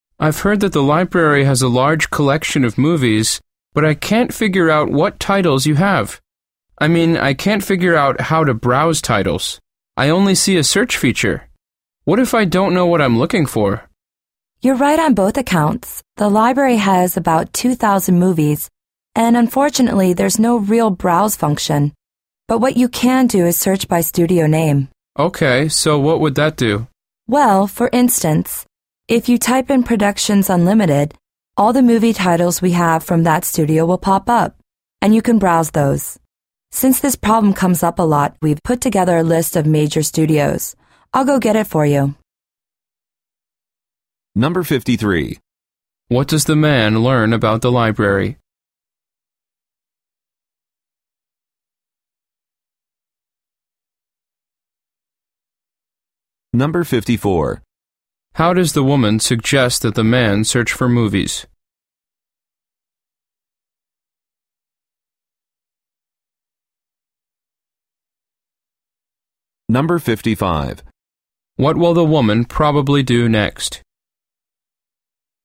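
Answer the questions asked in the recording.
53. It has about 2,000 movies but no browse function
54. By studio name
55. Get a list of major studios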